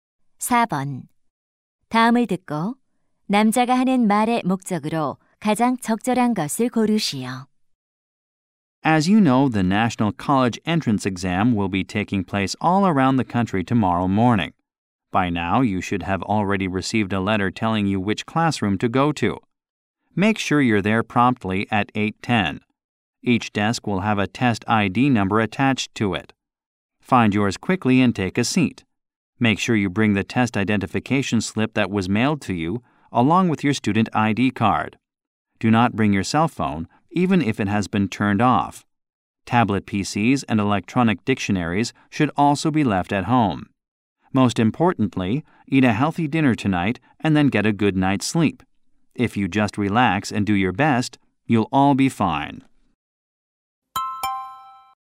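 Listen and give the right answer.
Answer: 수능 당일 유의 사항을 안내하려고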